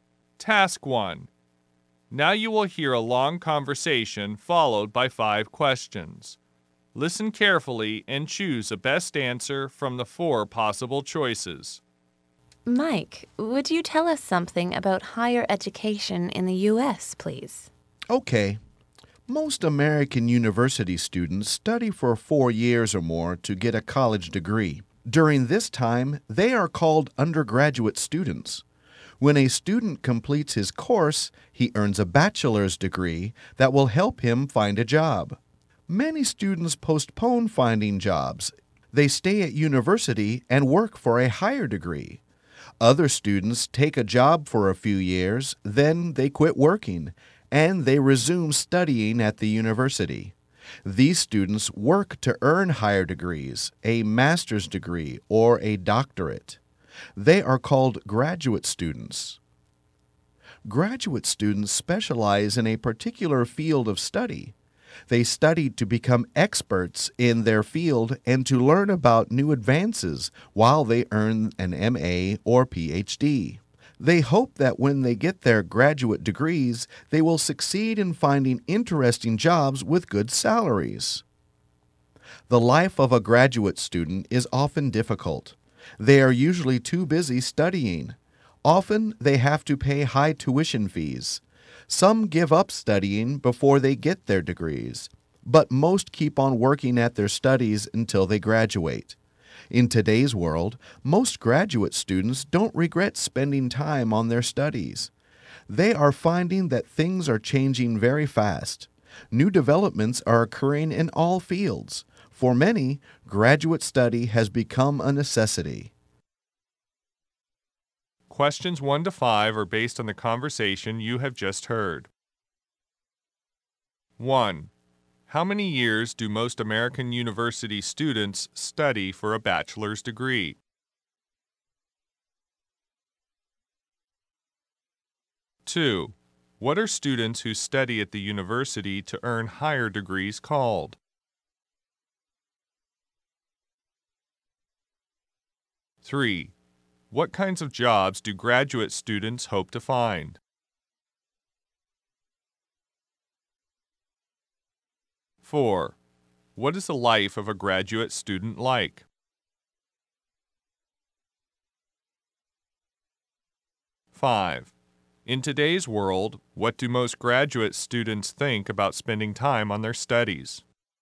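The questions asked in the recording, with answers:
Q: How many years do most American university students study for a bachelor's degree?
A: 4 years or more

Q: What are students who study at the university to earn higher degrees called?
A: Graduate students

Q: What kinds of jobs do graduate students hope to find?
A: Interesting jobs with good salaries

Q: What is the life of a graduate student like?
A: Often difficult

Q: In today's world, what do most graduate students think about spending time on their studies?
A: They don't regret it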